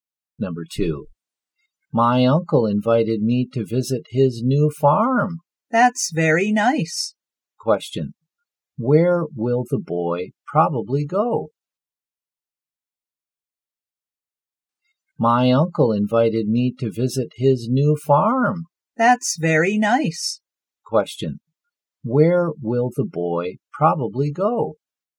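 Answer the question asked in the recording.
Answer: To his uncle's new farm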